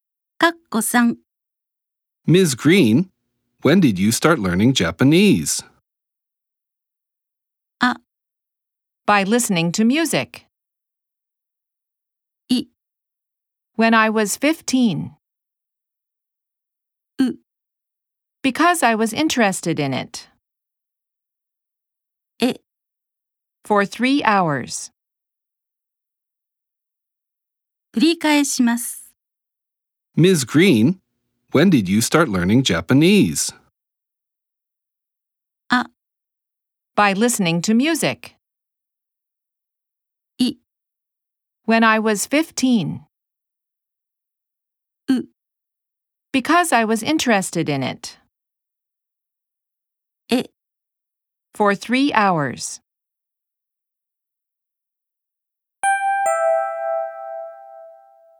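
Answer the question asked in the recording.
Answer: い: When I was 15.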